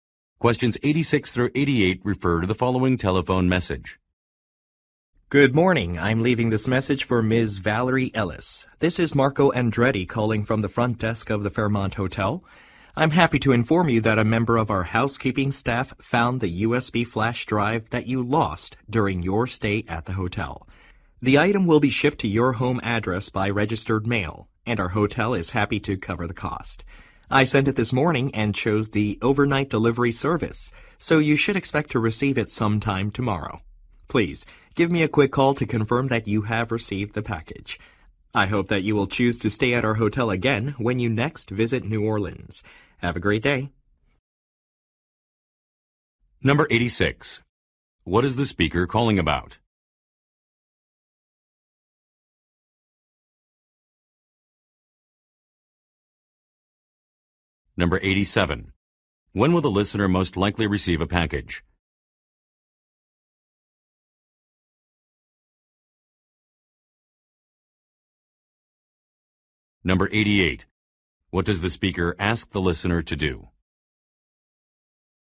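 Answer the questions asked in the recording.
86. A lost USB flash drive that staff found
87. Tomorrow
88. Call to confirm that she received the package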